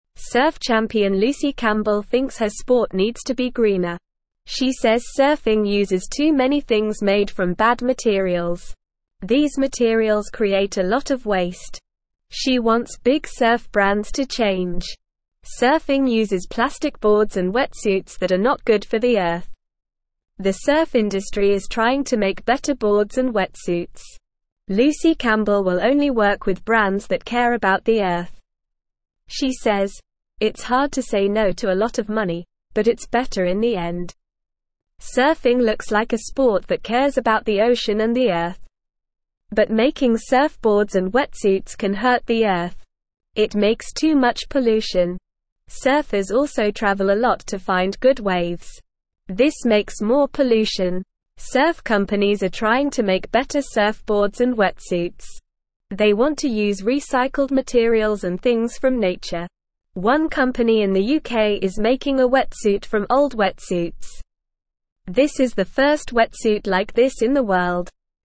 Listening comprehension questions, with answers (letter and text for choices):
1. Surf champion Lucy Campbell thinks her sport needs to be (1)______.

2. She says surfing uses too many things made from bad (2)_______.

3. Surfing uses plastic boards and wetsuits that are not good for the (3)______.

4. She says, "It's hard to say no to a lot of (4)______, but it's better in the end."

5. It makes too much (5)_______.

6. They want to use recycled materials and things from (6)_______.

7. This is the first wetsuit like this in the (7)_______.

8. What does Lucy Campbell think about surfing?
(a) It is a fun sport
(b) It needs to be greener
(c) It is easy to learn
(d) It is too expensive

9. What do surfers use that are not good for the Earth?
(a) Plastic boards and wetsuits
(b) Wooden boards and wetsuits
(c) Metal boards and wetsuits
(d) Glass boards and wetsuits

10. What does Lucy Campbell want big surf brands to do?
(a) Make cheaper products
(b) Make more money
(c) Teach more people to surf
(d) Change and be greener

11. Why is it hard for Lucy Campbell to say no to some brands?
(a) They are very popular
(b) They are her friends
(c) They offer a lot of money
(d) They make the best products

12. What is a problem with making surfboards and wetsuits?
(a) It is too expensive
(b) It makes too much pollution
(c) It is too easy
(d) It takes too much time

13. What do surfers do that makes more pollution?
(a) They litter on the beach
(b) They use too much sunscreen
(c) They travel a lot to find good waves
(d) They use too much water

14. What do surf companies want to use to make better products?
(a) Recycled materials and things from nature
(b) More plastic and metal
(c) Cheaper materials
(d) More colorful materials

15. What is special about the wetsuit made by a UK company?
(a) It is the cheapest wetsuit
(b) It is the most colorful wetsuit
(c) It is the fastest wetsuit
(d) It is made from old wetsuits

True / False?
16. Lucy Campbell is a swimming champion.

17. Lucy Campbell thinks surfing is very green.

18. Surfing uses plastic boards and wetsuits.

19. Surfing does not create any waste.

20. The surf industry is not trying to make better boards and wetsuits.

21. Lucy Campbell only works with brands that do not care about the Earth.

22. Surf companies want to use recycled materials.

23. A company in the UK made a wetsuit from old wetsuits.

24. What does Lucy Campbell think about her sport?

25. What materials does surfing use that are bad?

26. What does Lucy want big surf brands to do?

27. What are surfboards and wetsuits not good for?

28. What is the surf industry trying to make better?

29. What kind of brands will Lucy Campbell work with?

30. What are surf companies trying to use for surfboards and wetsuits?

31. What is special about the wetsuit made by the UK company?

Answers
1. greener
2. materials
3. Earth
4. money
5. pollution
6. nature
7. world
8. (b) It needs to be greener
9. (a) Plastic boards and wetsuits
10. (d) Change and be greener
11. (c) They offer a lot of money
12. (b) It makes too much pollution
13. (c) They travel a lot to find good waves
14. (a) Recycled materials and things from nature
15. (d) It is made from old wetsuits
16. False
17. False
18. True
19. False
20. False
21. False
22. True
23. True
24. Lucy Campbell thinks her sport needs to be greener.
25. Surfing uses plastic boards and wetsuits that are not good for the Earth.
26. Lucy wants big surf brands to change and use better materials.
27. Surfboards and wetsuits are not good for the Earth.
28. The surf industry is trying to make better boards and wetsuits.
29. Lucy Campbell will work with brands that care about the Earth.
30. Surf companies are trying to use recycled materials and things from nature.
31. The wetsuit made by the UK company is special because it is made from old wetsuits.

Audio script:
Surf champion Lucy Campbell thinks her sport needs to be greener. She says surfing uses too many things made from bad materials. These materials create a lot of waste. She wants big surf brands to change.
Surfing uses plastic boards and wetsuits that are not good for the Earth. The surf industry is trying to make better boards and wetsuits. Lucy Campbell will only work with brands that care about the Earth. She says, "It's hard to say no to a lot of money, but it's better in the end."
Surfing looks like a sport that cares about the ocean and the Earth. But making surfboards and wetsuits can hurt the Earth. Surfers also travel a lot to find good waves. This makes more pollution.
Surf companies are trying to make better surfboards and wetsuits. They want to use recycled materials and things from nature. One company in the UK is making a wetsuit from old wetsuits. This is the first wetsuit like this in the world.

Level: Level 1